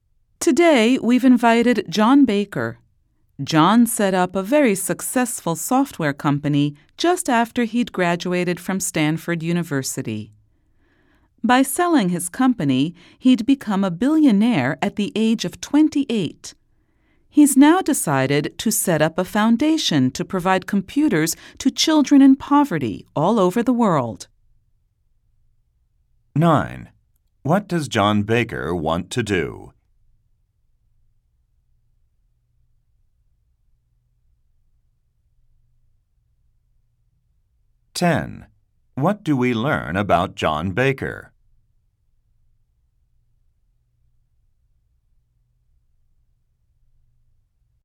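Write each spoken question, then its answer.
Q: What does John Baker want to do?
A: Set up a foundation to provide computers to children in poverty.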